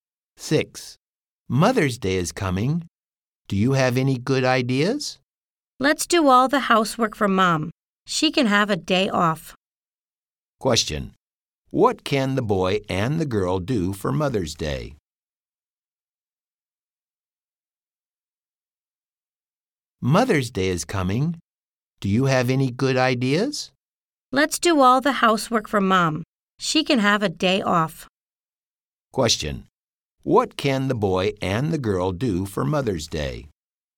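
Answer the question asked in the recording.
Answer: Do all the housework for Mom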